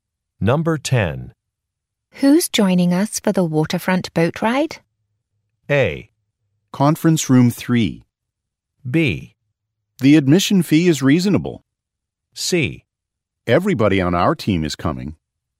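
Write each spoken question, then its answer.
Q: Who's joining us for the waterfront boat ride?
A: C: Everybody on our team is coming.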